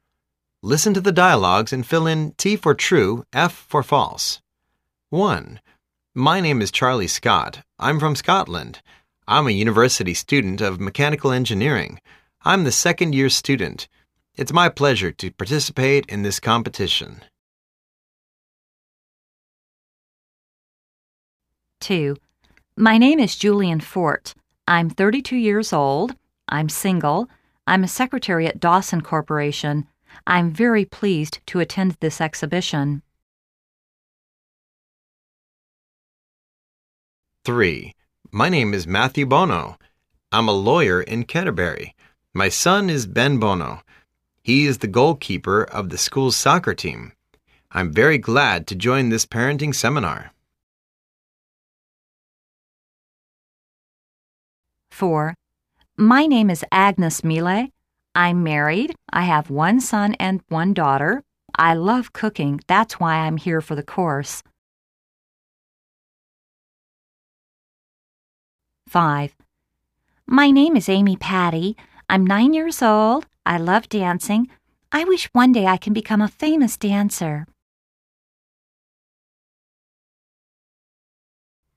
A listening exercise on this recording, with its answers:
Listen to the dialogues and fill in T for "True",F for "False".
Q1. He is a Scottish.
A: T

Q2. She is married.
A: F

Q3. His name is Ben Bono.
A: F

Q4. She doesn't like cooking.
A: F

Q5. She's a dancer.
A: F